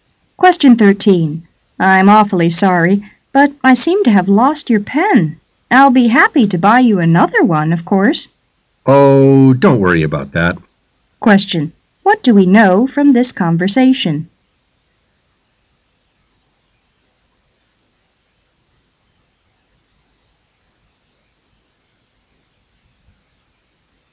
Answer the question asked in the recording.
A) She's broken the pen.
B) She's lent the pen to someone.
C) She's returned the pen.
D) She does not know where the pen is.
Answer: D) She does not know where the pen is.

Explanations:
W: I'm awfully sorry, but I seem to have lost your pen. I'1l be happy to buy you another one, of course. M: Oh, don' t worry about that. Q: What do we know from this conversation?